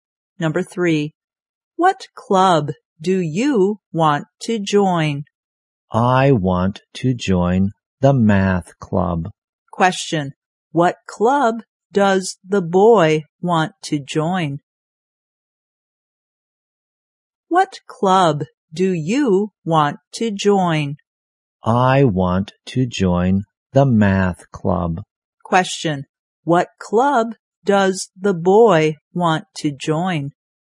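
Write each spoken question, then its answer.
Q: what club does the boy want to join?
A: The math club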